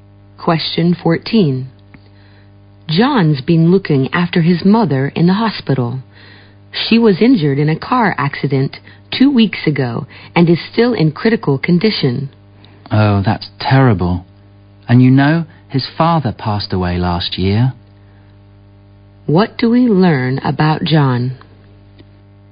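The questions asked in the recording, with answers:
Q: What do we learn about John?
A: He is caring for his badly injured mother; his father died last year.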